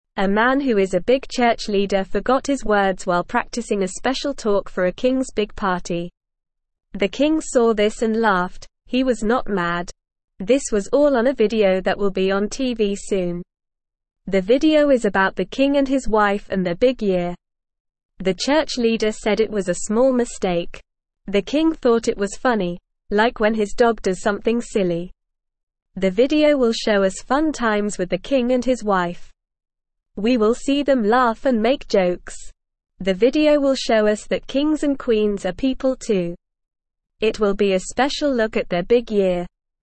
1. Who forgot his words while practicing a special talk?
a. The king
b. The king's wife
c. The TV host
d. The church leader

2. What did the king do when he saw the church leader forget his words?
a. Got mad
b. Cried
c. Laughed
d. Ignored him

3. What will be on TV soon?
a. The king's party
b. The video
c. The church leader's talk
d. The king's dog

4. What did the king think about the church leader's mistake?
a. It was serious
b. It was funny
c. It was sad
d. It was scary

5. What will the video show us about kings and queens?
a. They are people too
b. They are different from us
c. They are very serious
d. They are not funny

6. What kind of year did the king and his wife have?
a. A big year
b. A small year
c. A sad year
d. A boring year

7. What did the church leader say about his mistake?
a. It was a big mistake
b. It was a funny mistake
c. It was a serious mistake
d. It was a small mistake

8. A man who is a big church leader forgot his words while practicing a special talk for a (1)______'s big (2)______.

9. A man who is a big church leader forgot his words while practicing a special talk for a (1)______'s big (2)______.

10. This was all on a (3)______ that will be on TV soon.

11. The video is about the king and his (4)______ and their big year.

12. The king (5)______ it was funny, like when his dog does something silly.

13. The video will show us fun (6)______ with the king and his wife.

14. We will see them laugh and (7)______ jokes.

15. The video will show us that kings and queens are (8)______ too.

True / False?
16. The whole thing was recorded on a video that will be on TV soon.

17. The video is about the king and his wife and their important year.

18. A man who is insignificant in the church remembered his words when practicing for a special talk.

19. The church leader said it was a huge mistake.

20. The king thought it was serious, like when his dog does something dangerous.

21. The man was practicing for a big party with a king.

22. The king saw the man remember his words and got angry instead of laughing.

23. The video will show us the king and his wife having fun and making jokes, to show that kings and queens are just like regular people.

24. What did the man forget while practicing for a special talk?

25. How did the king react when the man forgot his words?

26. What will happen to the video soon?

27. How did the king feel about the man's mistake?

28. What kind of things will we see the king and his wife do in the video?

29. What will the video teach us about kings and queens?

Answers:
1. d. The church leader
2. c. Laughed
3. b. The video
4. b. It was funny
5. a. They are people too
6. a. A big year
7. d. It was a small mistake
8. king
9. party
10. video
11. wife
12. thought
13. times
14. make
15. people
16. True
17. True
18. False
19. False
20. False
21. True
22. False
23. True
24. The man forgot his words while practicing for a special talk.
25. The king laughed when the man forgot his words.
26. The video will be on TV soon.
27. The king thought it was funny, like when his dog does something silly.
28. We will see them laugh and make jokes in the video.
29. The video will teach us that kings and queens are people too.

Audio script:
A man who is a big church leader forgot his words while practicing a special talk for a king's big party. The king saw this and laughed, he was not mad. This was all on a video that will be on TV soon. The video is about the king and his wife and their big year. The church leader said it was a small mistake.
The king thought it was funny, like when his dog does something silly. The video will show us fun times with the king and his wife. We will see them laugh and make jokes. The video will show us that kings and queens are people too. It will be a special look at their big year.

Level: Level 1

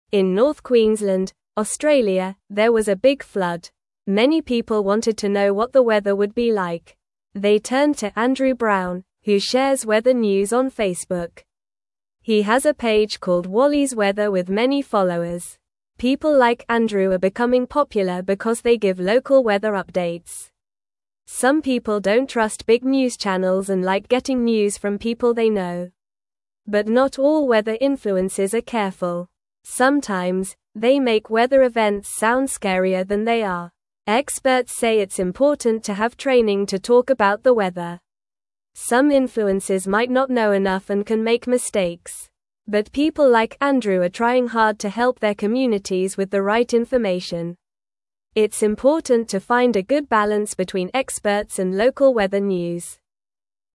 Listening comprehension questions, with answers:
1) Where did the big flood happen?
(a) South Queensland, Australia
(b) North Sydney, Australia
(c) South Sydney, Australia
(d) North Queensland, Australia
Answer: (d) North Queensland, Australia

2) Who shares weather news on Facebook?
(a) John Smith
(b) Emily White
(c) Sarah Green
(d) Andrew Brown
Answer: (d) Andrew Brown

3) What is the name of Andrew's weather page?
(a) Wally's Weather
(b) Sunny Weather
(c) Rainy Days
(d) Weather Watch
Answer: (a) Wally's Weather

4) Why do some people trust local weather updates more?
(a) They like big news channels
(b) They want to hear about other countries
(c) They know the people giving the news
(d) They don't care about the weather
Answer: (c) They know the people giving the news

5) What do experts say is important for talking about the weather?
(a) Being funny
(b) Having training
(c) Making it sound scary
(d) Using big words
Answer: (b) Having training

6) What can happen if weather influencers make mistakes?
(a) They can give wrong information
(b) They can become famous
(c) They can make people laugh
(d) They can get more followers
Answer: (a) They can give wrong information

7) What is Andrew trying to do for his community?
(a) Make people scared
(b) Help with the right information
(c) Sell weather products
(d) Ignore the news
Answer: (b) Help with the right information

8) What is important to find between experts and local weather news?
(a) More followers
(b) More channels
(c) A good balance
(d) Less information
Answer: (c) A good balance

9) In North Queensland, (1)______, there was a big (2)______.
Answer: Australia

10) In North Queensland, (1)______, there was a big (2)______.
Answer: flood

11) Many people wanted to know what the (3)______ would be like.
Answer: weather

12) He has a page called Wally's (4)______ with many followers.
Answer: Weather

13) (5)______ like Andrew are becoming popular because they give local weather updates.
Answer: People

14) But not all weather influencers are (7)______.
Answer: careful

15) Sometimes, they make weather events (8)______ scarier than they are.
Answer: sound

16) Experts say it's important to have (9)______ to talk about the weather.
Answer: training

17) But people like Andrew are trying hard to (10)______ their (11)______ with the right information.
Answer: help

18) But people like Andrew are trying hard to (10)______ their (11)______ with the right information.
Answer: communities

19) It's important to find a (12)______ balance between experts and local weather news.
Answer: good

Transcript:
In North Queensland, Australia, there was a big flood. Many people wanted to know what the weather would be like. They turned to Andrew Brown, who shares weather news on Facebook. He has a page called Wally's Weather with many followers.
People like Andrew are becoming popular because they give local weather updates. Some people don't trust big news channels and like getting news from people they know. But not all weather influencers are careful. Sometimes, they make weather events sound scarier than they are.
Experts say it's important to have training to talk about the weather. Some influencers might not know enough and can make mistakes. But people like Andrew are trying hard to help their communities with the right information. It's important to find a good balance between experts and local weather news.

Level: Level 2

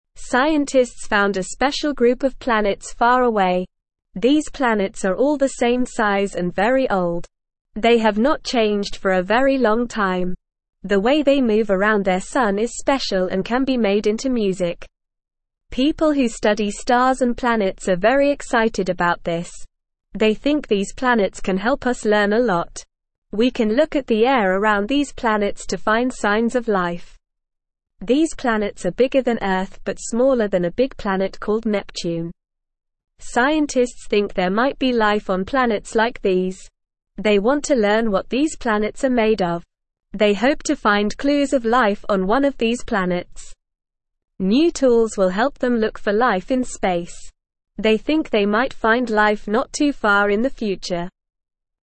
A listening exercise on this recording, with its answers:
Listen and Fill in the Gaps:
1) Scientists (1)______ a special group of (2)______ far away.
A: found

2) Scientists (1)______ a special group of (2)______ far away.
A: planets

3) They think these planets can (3)______ us (4)______ a lot.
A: help

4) They think these planets can (3)______ us (4)______ a lot.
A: learn

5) These planets are bigger than Earth but smaller than a big planet (5)______ (6)______.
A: called

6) These planets are bigger than Earth but smaller than a big planet (5)______ (6)______.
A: Neptune

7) They hope to (7)______ clues of life on one of these planets.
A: find

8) New (8)______ will help them look for life in space.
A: tools

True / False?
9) The way these planets move around their sun can be turned into music.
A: True

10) People who study stars and planets are very apathetic about these planets.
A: False

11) These planets have not changed for a long time.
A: True

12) Scientists believe that these planets can teach us a lot.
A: True

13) Scientists think there might be life on these planets.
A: True

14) Scientists discovered a group of planets that are all different sizes and very new.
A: False

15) New tools will hinder scientists from searching for signs of life on these planets.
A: False

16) These planets are smaller than Earth but bigger than Neptune.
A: False

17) What is special about these planets?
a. They are bigger than Earth and Neptune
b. They are all the same size and very old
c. They can't be seen from Earth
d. They are made of music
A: b. They are all the same size and very old

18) What can scientists learn from these planets?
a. Nothing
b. A lot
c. Only a little bit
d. Everything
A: b. A lot

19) What can scientists find by looking at the air around these planets?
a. Signs of water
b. Signs of music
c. Signs of aliens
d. Signs of life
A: d. Signs of life

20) How big are these planets compared to Earth?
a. Smaller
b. The same size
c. Bigger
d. They are made of music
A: c. Bigger

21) What do scientists hope to find on one of these planets?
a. Clues of water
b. Clues of music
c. Clues of aliens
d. Clues of life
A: d. Clues of life

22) What will help scientists look for life in space?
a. Old tools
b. No tools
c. New tools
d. A telescope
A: c. New tools

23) When do scientists think they might find life?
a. Not too far in the future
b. Never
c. In the past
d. Right now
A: a. Not too far in the future

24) Are these planets the same size or different sizes?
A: These planets are all the same size.

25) Have these planets changed for a long time?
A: No, these planets have not changed for a very long time.

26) What can we find by looking at the air around these planets?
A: We can find signs of life by looking at the air around these planets.

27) Are these planets bigger or smaller than Earth?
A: These planets are bigger than Earth.

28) What do scientists think might be on these planets?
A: Scientists think there might be life on these planets.

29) Will scientists find life on these planets soon or in the future?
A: Scientists think they might find life not too far in the future.

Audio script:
Scientists found a special group of planets far away. These planets are all the same size and very old. They have not changed for a very long time. The way they move around their sun is special and can be made into music.
People who study stars and planets are very excited about this. They think these planets can help us learn a lot. We can look at the air around these planets to find signs of life. These planets are bigger than Earth but smaller than a big planet called Neptune.
Scientists think there might be life on planets like these. They want to learn what these planets are made of. They hope to find clues of life on one of these planets. New tools will help them look for life in space. They think they might find life not too far in the future.

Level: Level 1

